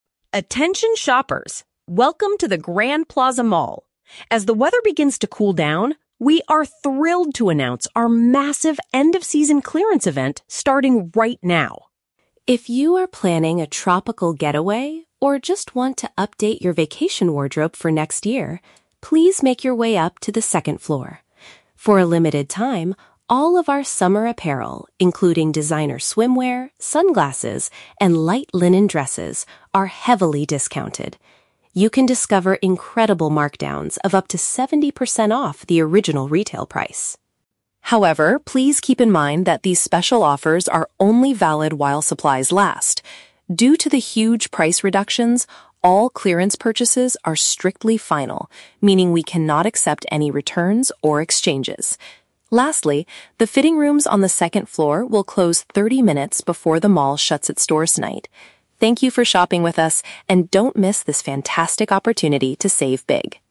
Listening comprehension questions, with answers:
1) What are the shoppers encouraged to do?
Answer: Visit the second floor to buy cheap summer clothes.

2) What is the store's policy regarding the sale items?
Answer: They cannot be brought back for a refund or swap.

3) What does the announcer say about the fitting rooms?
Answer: They will shut down half an hour before the mall closes.

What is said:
Announcer: Attention shoppers! Welcome to the Grand Plaza Mall. As the weather begins to cool down, we are thrilled to announce our massive end-of-season clearance event starting right now!
If you are planning a tropical getaway or just want to update your vacation wardrobe for next year, please make your way up to the second floor. For a limited time, all of our summer apparel, including designer swimwear, sunglasses, and light linen dresses, are heavily discounted. You can discover incredible markdowns of up to seventy percent off the original retail price.
However, please keep in mind that these special offers are only valid while supplies last. Due to the huge price reductions, all clearance purchases are strictly final, meaning we cannot accept any returns or exchanges. Lastly, the fitting rooms on the second floor will close thirty minutes before the mall shuts its doors tonight.